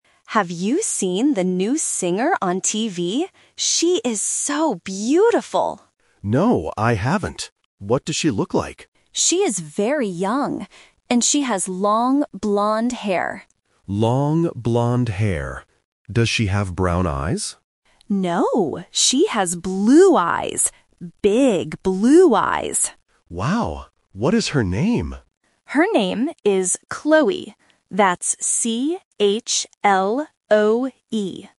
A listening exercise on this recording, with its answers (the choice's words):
Listen to the conversation and choose the correct answer (A, B, or C).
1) What kind of hair does the singer have?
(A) Short, blond hair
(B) Long, blond hair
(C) Long, black hair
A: Long, blond hair

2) What color are her eyes?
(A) Brown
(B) Green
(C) Blue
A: Blue

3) How do you spell the singer's name?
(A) K-L-O-E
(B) C-H-L-O-E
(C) C-L-O-E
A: C-H-L-O-E

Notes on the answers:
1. Student A describes the singer by saying, "she has long, blond hair." Why the trap is wrong: Option (A) Short, blond hair is a trap because it has the correct color but the wrong length. Option (C) Long, black hair is plausible but not mentioned in the audio.
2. Student A clearly states, "she has blue eyes." Why the trap is wrong: Option (A) Brown is a trap. Student B asks if she has brown eyes, but Student A says "No". Option (B) Green is a common eye color but is never mentioned.
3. Student A spells the name out loud: "C-H-L-O-E." Why the trap is wrong: Option (A) K-L-O-E is a phonetic trap because the letter "C" often sounds like "K", which easily confuses A1 learners. Option (C) C-L-O-E is missing the "H".